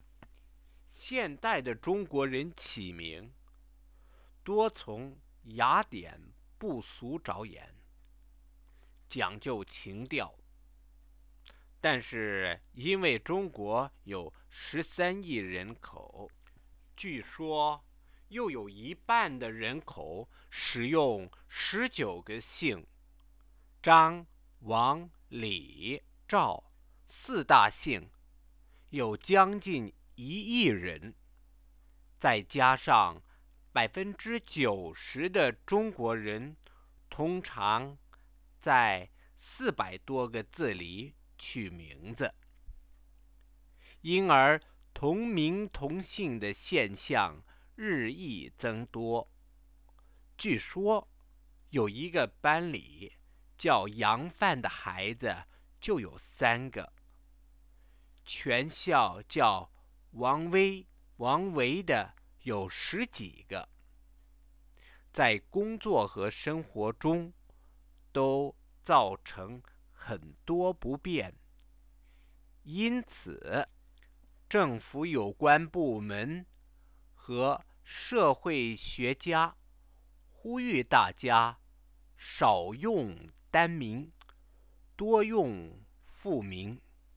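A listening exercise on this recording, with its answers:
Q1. Why are there so many people who share the same names in China?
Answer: China has 1.3 billion people, half of them use only 19 surnames, and 90% of Chinese choose given names from just over 400 characters.

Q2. What does the Chinese government ask people to do when giving names to their children?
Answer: To use fewer single-character given names and more two-character names.

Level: 2nd year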